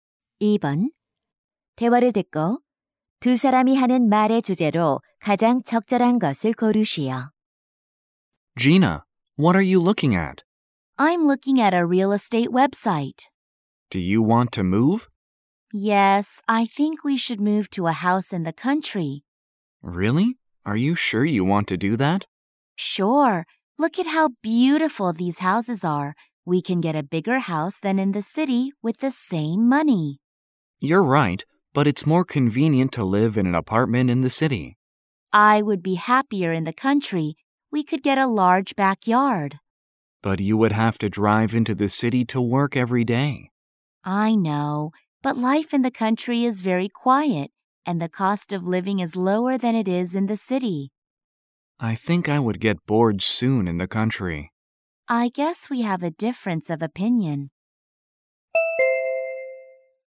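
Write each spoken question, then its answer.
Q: 대화를 듣고 두 사람이 하는 말의 주제로 가장 적절한 것을 고르시오.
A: 시골 주택 생활과 도시 아파트 생활의 장단점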